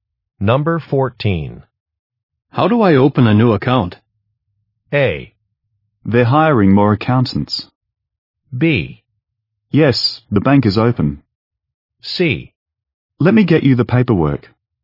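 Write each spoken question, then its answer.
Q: How do I open a new account?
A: C: Let me get you the paperwork.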